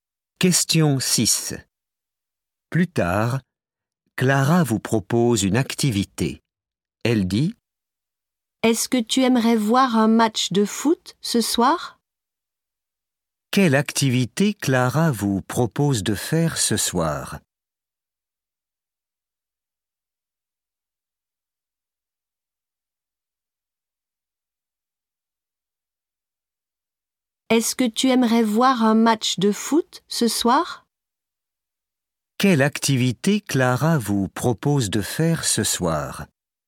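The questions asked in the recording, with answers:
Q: Quelle activité Clara vous propose de faire ce soir?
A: Voir un match de foot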